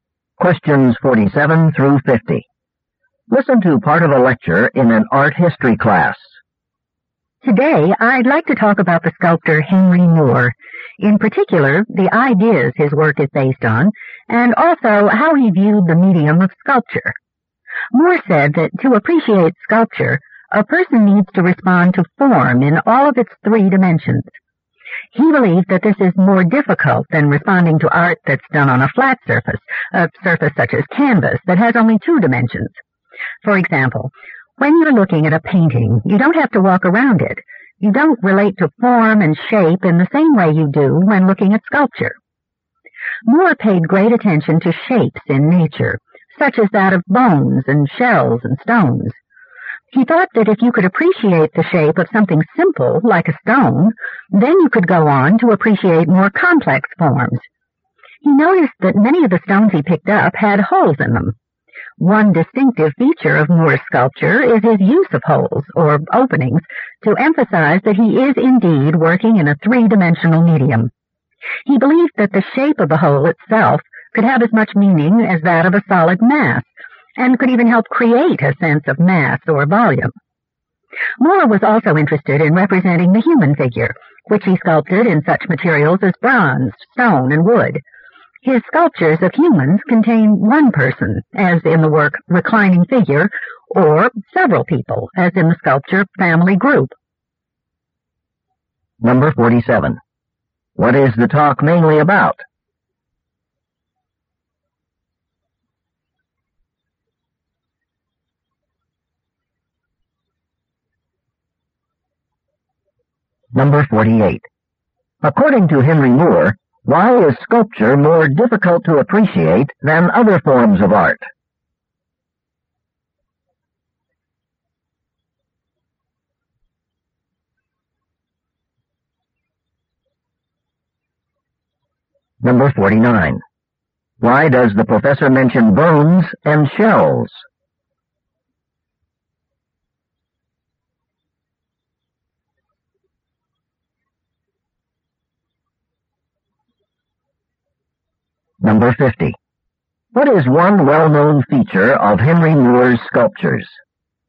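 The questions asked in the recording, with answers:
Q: What is the talk mainly about?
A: Henry Moore's sculpture and ideas

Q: According to Henry Moore, why is sculpture more difficult to appreciate than other forms of art?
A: You must respond to form in three dimensions

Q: Why does the professor mention bones and shells?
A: As natural shapes that inspired Moore

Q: What is one well-known feature of Henry Moore's sculptures?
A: Holes or openings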